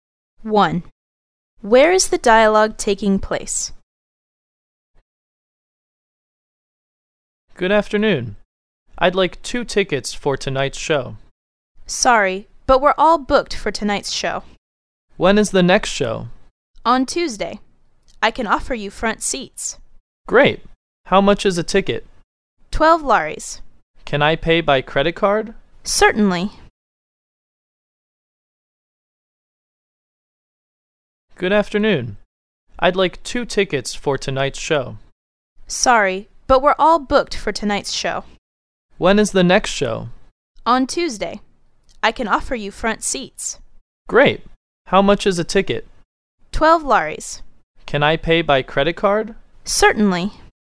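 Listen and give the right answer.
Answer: At a theatre box office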